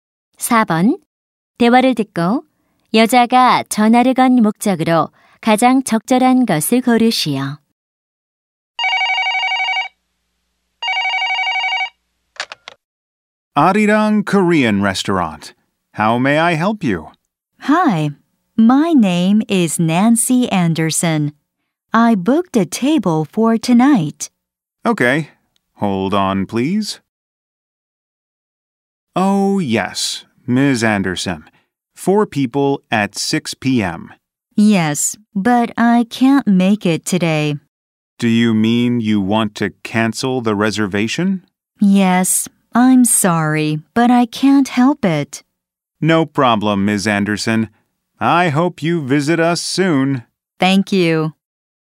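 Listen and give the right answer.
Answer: 식당 예약을 취소하려고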